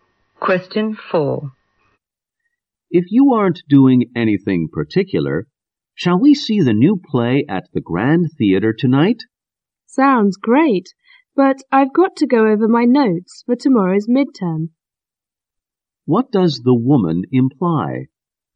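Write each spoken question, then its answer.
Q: What does the woman imply?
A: She can't go because she has to study her notes for tomorrow's midterm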